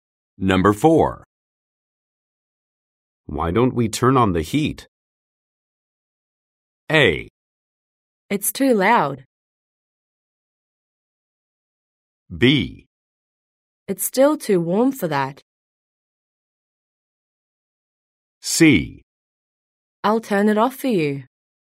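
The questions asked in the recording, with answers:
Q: Why don't we turn on the heat?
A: B: It's still too warm for that.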